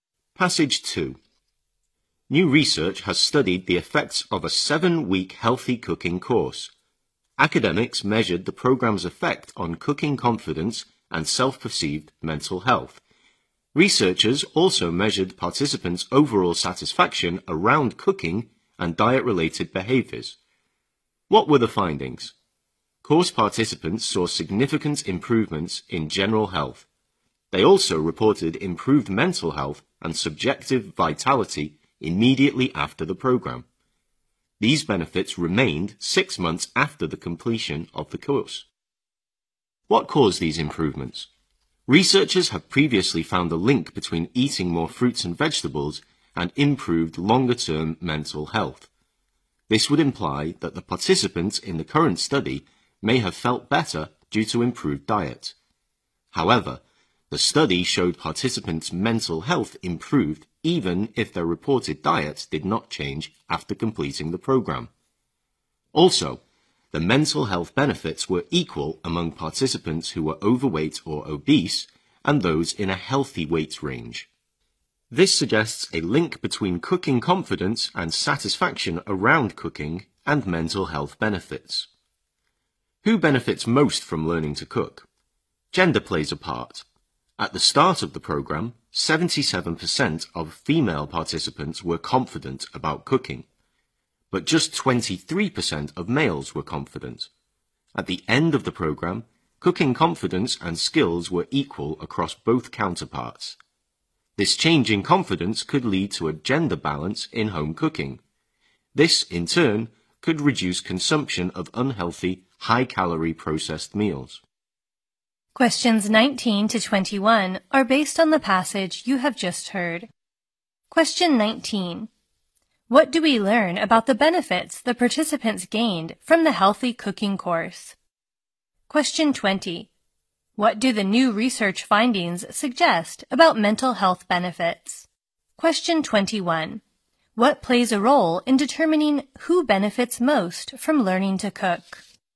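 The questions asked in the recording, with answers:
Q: What do we learn about the benefits the participants gained from the healthy cooking course?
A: They lasted; they remained 6 months after the course

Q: What do the new research findings suggest about mental health benefits?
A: They are linked to cooking confidence and satisfaction around cooking

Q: What plays a role in determining who benefits most from learning to cook?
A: Gender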